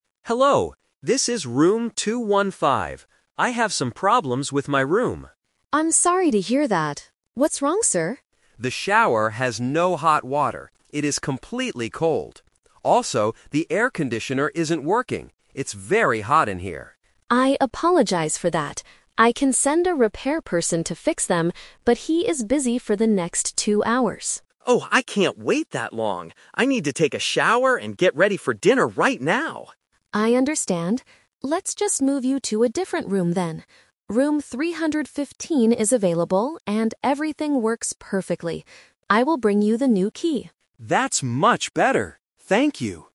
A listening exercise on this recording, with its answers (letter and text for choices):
Listen to a guest complaining to a hotel receptionist. Choose the correct answer (A, B, or C) for each question.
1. What is the problem in the bathroom?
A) The shower is very dirty.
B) There is no hot water.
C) The door is broken.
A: B) There is no hot water.

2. Why can't the repair person come immediately?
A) He is busy for two hours.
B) He is not working today.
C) He went out for dinner.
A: A) He is busy for two hours.

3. How do they solve the problem? (The Twist)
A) The guest waits two hours for the repair person.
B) The guest goes out for dinner without showering.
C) The receptionist moves the guest to a new room.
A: C) The receptionist moves the guest to a new room.

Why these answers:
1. The guest clearly states his first problem: "The shower has no hot water. It is completely cold."
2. The receptionist explains the situation: "...he is busy for the next two hours."
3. This is the Twist. The original plan was to fix the items, but because it takes too long, the receptionist changes the plan. She says, "Let's just move you to a different room then."

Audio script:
Guest: Hello, this is room 215. I have some problems with my room.
Receptionist: I'm sorry to hear that. What's wrong, sir?
Guest: The shower has no hot water. It is completely cold. Also, the air conditioner isn't working. It's very hot in here.
Receptionist: I apologize for that. I can send a repair person to fix them, but he is busy for the next two hours.
Guest: Oh, I can't wait that long! I need to take a shower and get ready for dinner right now.
Receptionist: I understand. Let's just move you to a different room then. Room 315 is available and everything works perfectly. I will bring you the new key.